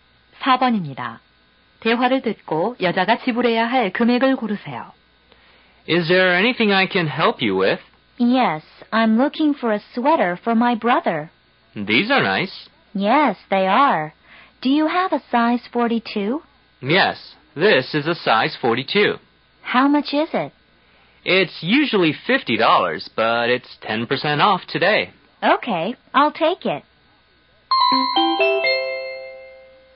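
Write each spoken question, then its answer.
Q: 대화를 듣고 여자가 지불해야 할 금액을 고르세요.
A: 45달러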